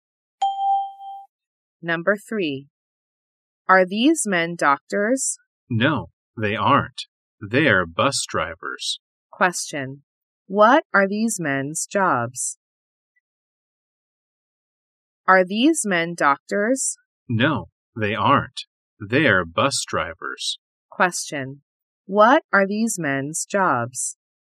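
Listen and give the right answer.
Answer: They're bus drivers.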